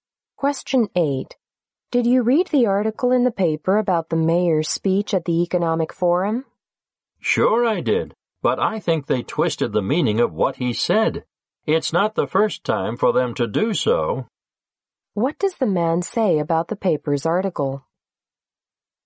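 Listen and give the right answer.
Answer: It distorted the mayor's words.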